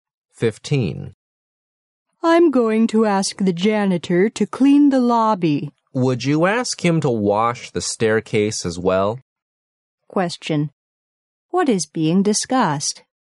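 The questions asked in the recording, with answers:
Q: What is being discussed?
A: Cleaning the lobby and the staircase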